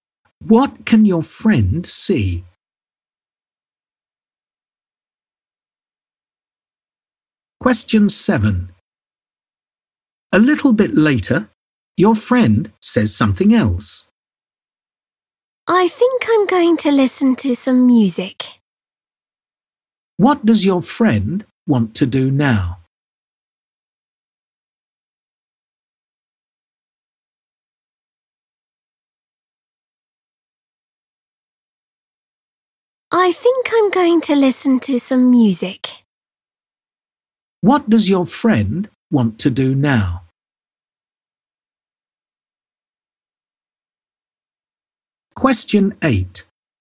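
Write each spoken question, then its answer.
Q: What does your friend want to do now?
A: Listen to some music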